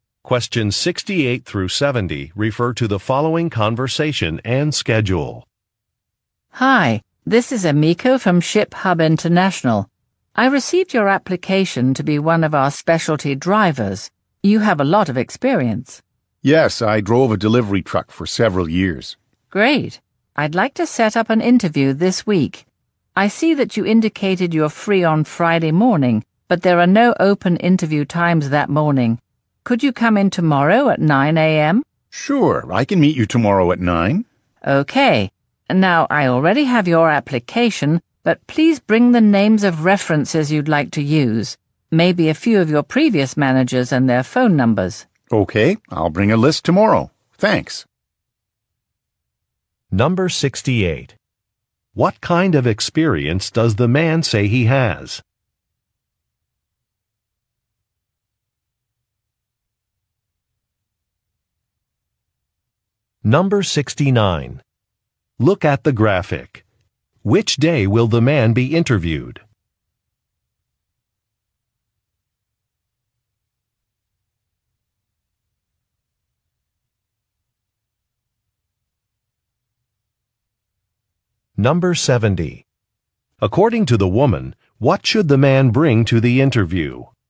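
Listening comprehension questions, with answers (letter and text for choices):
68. What kind of experience does the man say he has?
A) Advertising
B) Customer service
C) Delivery driving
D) Marketing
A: C) Delivery driving

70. According to the woman, what should the man bring to the interview?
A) A list of references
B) A professional certificate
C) A photo ID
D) A printed application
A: A) A list of references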